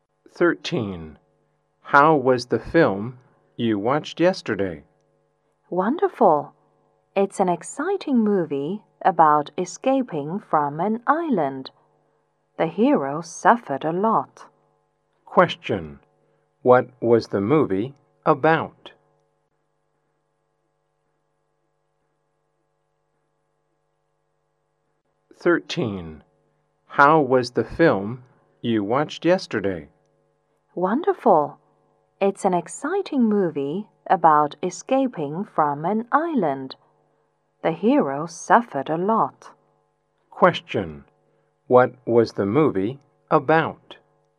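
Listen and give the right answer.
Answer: Escaping from an island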